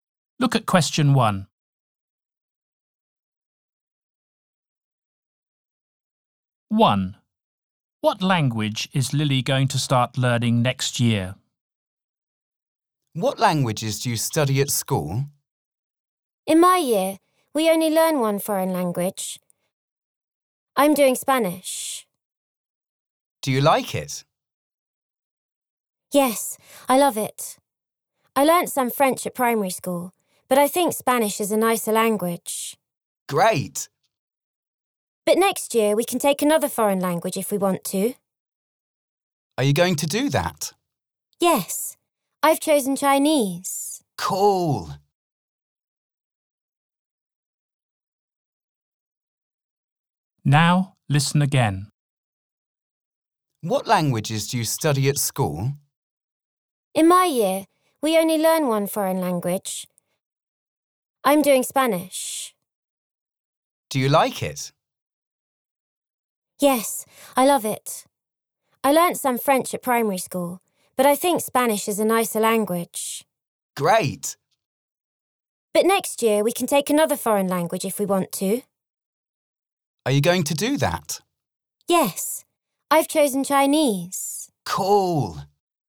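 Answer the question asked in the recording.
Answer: Chinese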